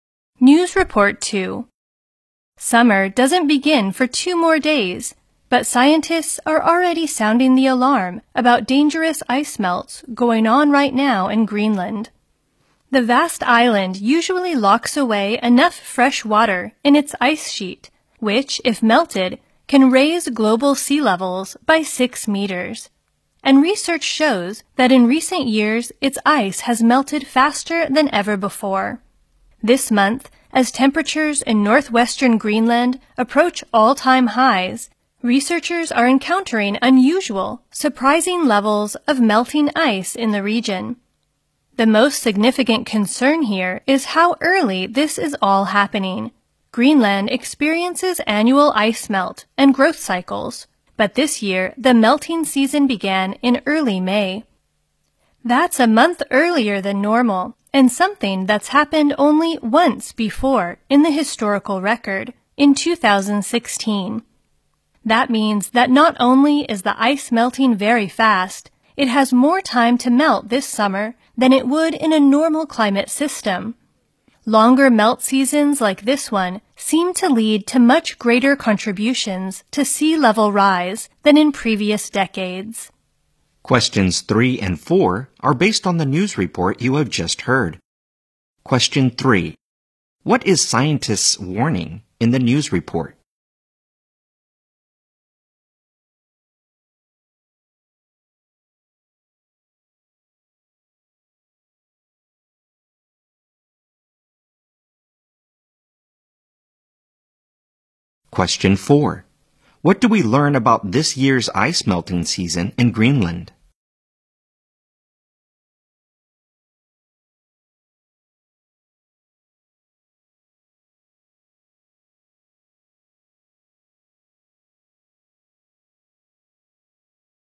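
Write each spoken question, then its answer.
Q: What is scientists' warning in the news report?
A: Dangerous ice melts are going on right now in Greenland

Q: What do we learn about this year's ice melting season in Greenland?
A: It began in early May, a month earlier than normal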